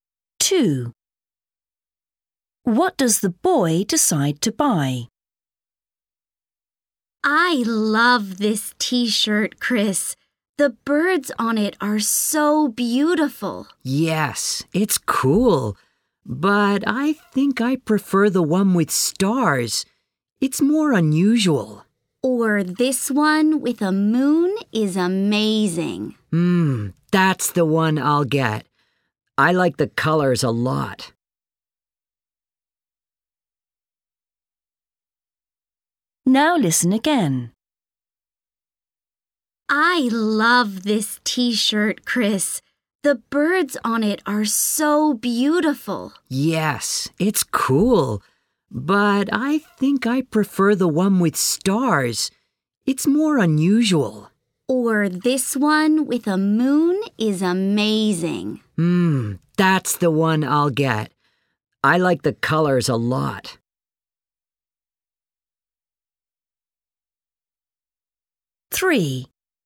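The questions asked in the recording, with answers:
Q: What does the boy decide to buy?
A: the t-shirt with a moon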